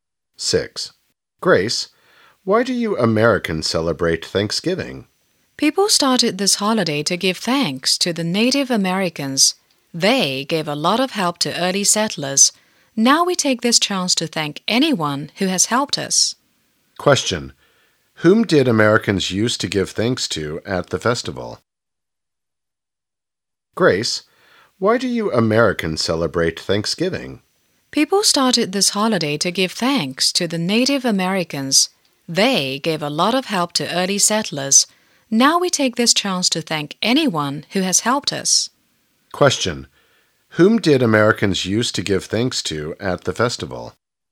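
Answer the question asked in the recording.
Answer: The Native Americans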